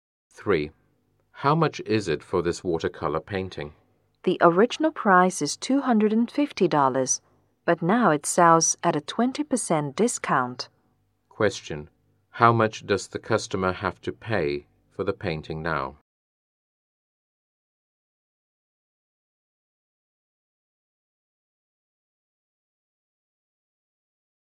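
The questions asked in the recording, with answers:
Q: how much does the customer have to pay for the painting now?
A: $200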